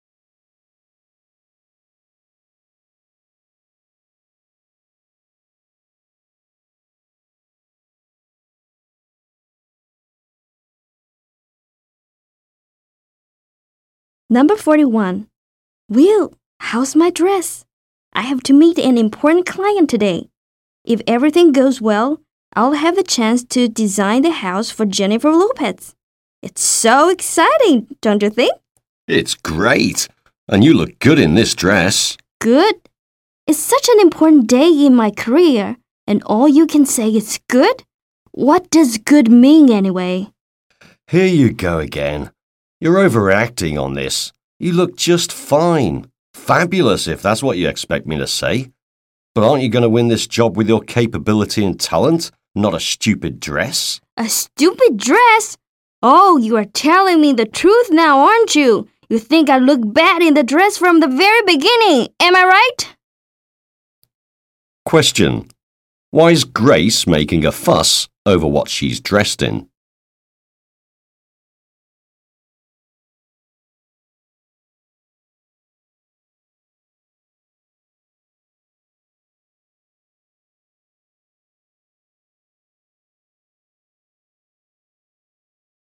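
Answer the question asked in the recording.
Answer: She is meeting an important client who could let her design a house for Jennifer Lopez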